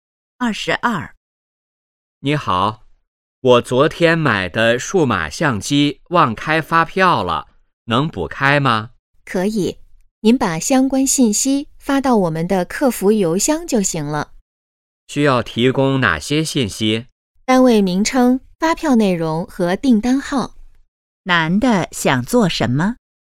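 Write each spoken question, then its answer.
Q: 男的想做什么?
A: 补开发票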